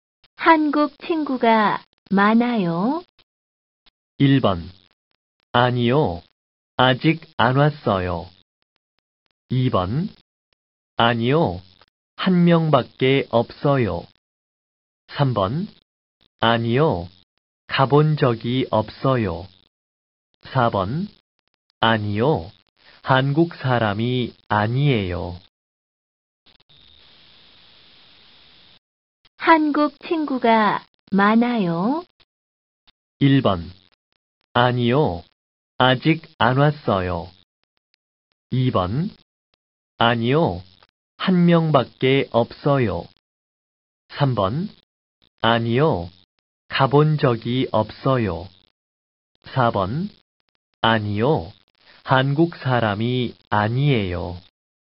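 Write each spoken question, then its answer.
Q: 한국 친구가 많아요?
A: 2: 아니요, 한 명밖에 없어요.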